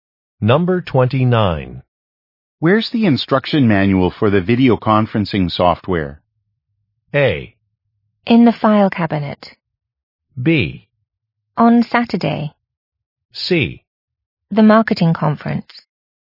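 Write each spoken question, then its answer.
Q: Where's the instruction manual for the video conferencing software?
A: A: In the file cabinet.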